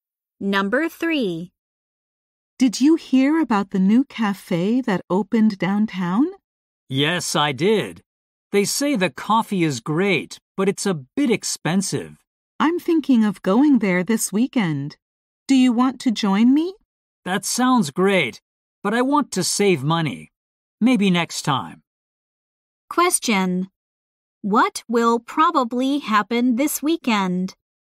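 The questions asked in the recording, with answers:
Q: What will probably happen this weekend?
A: The man will go to the new cafe without the woman.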